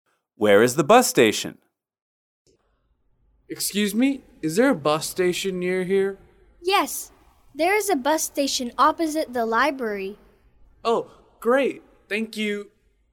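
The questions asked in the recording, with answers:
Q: Where is the bus station?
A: Opposite the library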